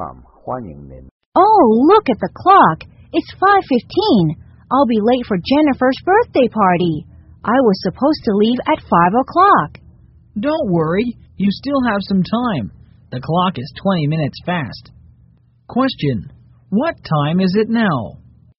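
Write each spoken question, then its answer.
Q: Question. What time is it now?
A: 4:55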